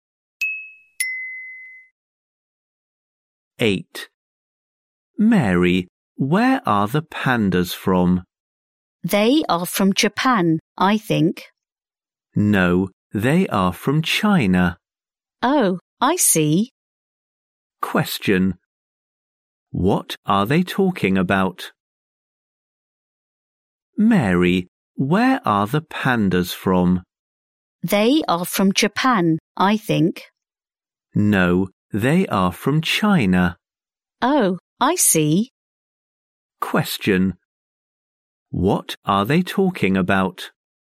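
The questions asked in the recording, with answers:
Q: What are they talking about?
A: Where the pandas are from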